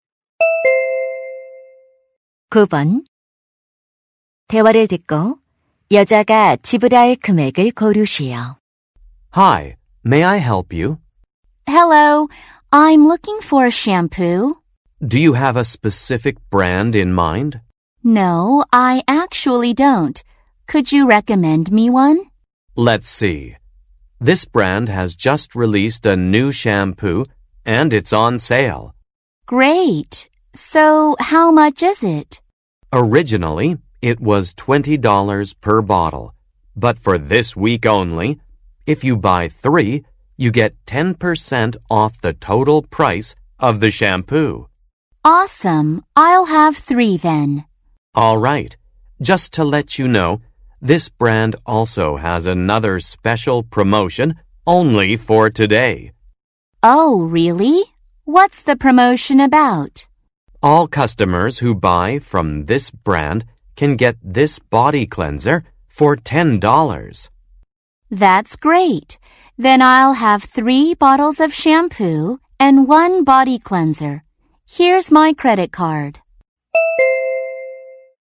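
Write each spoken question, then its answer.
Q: 대화를 듣고 여자가 지불할 금액을 고르시오.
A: $64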